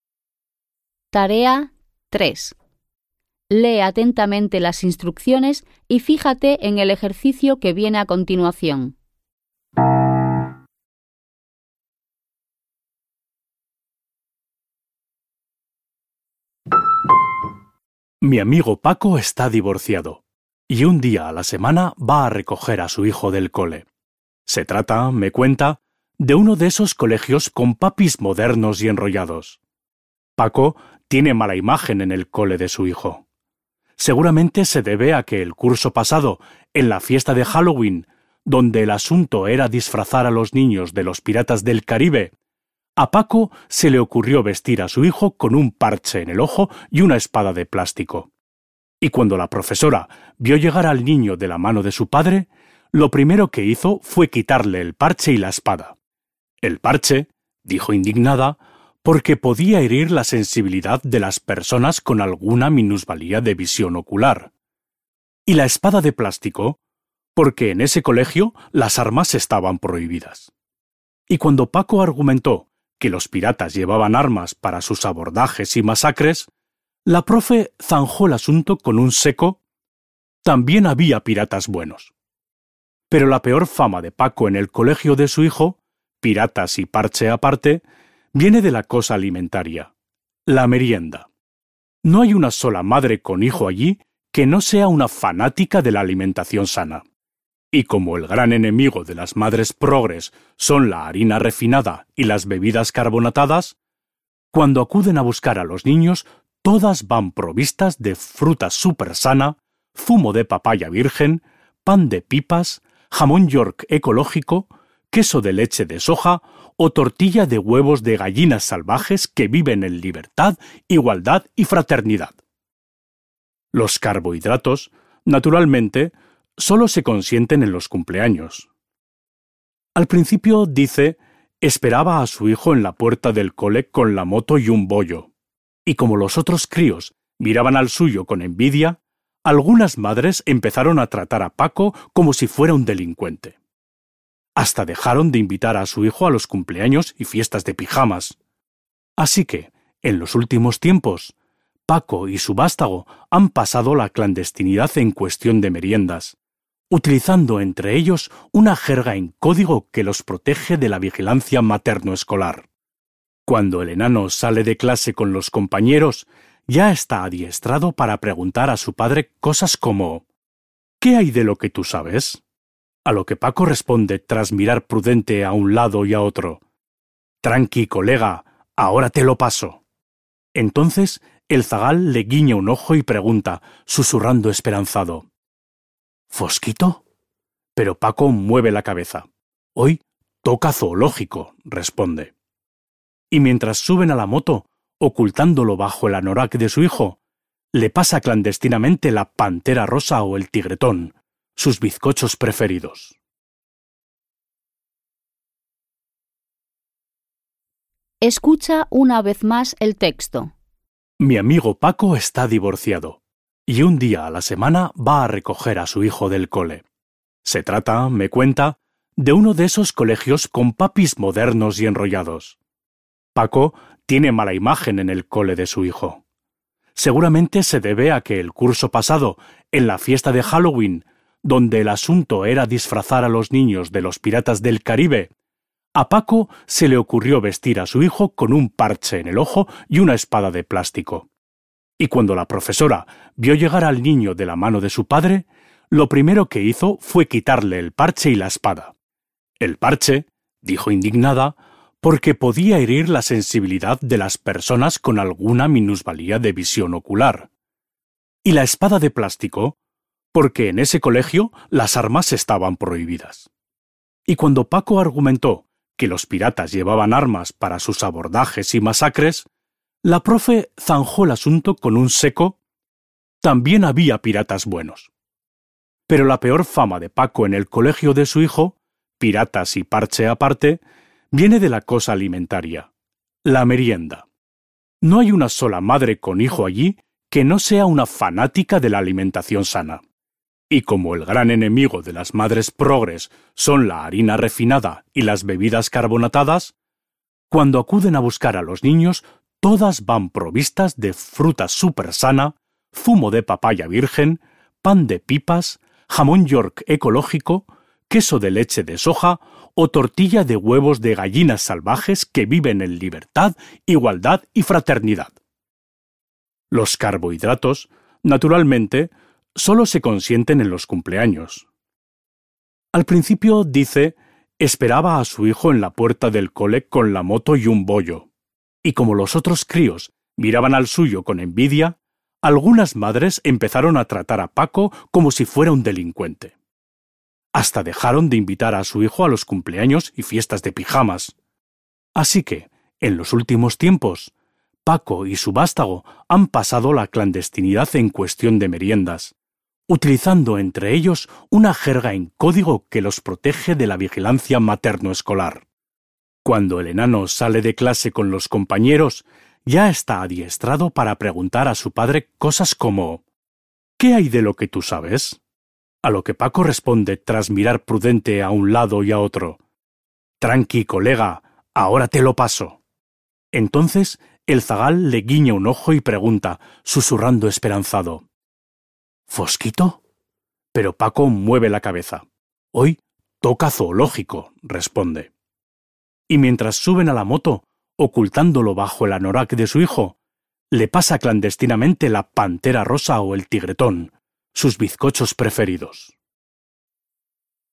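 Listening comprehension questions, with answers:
Vas a escuchar un texto sobre una determinada situación social. Posteriormente, responde a las preguntas que se presentan (3.1.–3.4.) de acuerdo con el contenido del texto. Intenta hacerlo de la manera más precisa posible. Escucharás la grabación dos veces.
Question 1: ¿Por qué la profesora consideró inadecuado llevar el parche como elemento del disfraz del hijo de Paco?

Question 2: ¿Qué postura adopta el hablante cuando describe la merienda de los compañeros del colegio del hijo de Paco?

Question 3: ¿Qué represalias sufrió el hijo de Paco por parte de las madres de sus compañeros?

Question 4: ¿En qué consiste la "clandestinidad" entre el padre y el hijo?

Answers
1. Porque podía herir la sensibilidad de las personas con alguna discapacidad visual.
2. Irónica, se burla de la obsesión de las madres por la comida sana.
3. Dejaron de invitarlo a los cumpleaños y fiestas de pijamas.
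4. Usan una jerga en código y el padre le pasa a escondidas bollos/bizcochos para merendar.

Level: Poziom: dwujęzyczny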